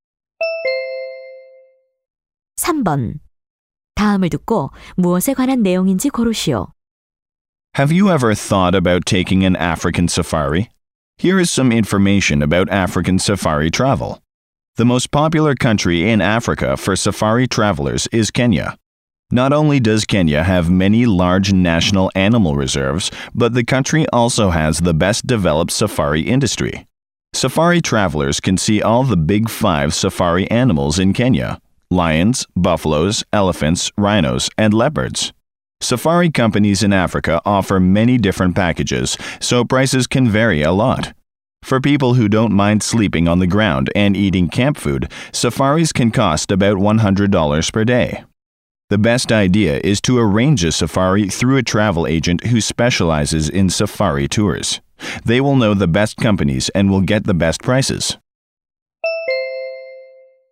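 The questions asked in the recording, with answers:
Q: 다음을 듣고 무엇에 관한 내용인지 고르시오.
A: 아프리카 사파리 여행 정보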